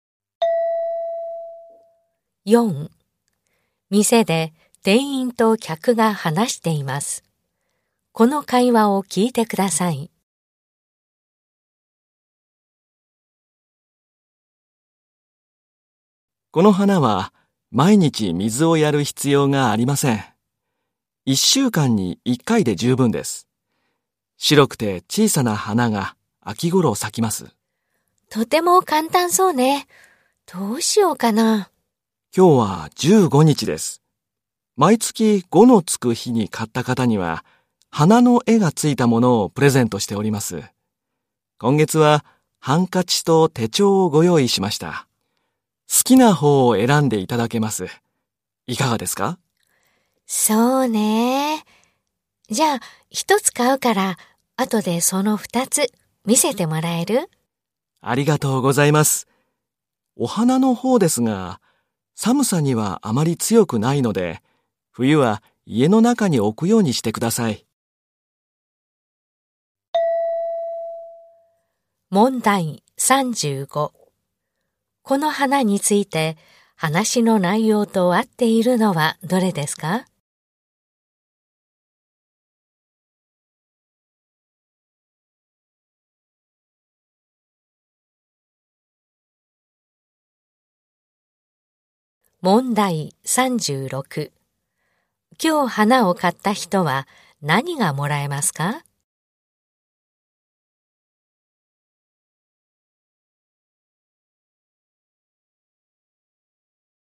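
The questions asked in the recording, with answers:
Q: 今日花を買った人は何がもらえますか?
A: 花の絵がついたハンカチか手帳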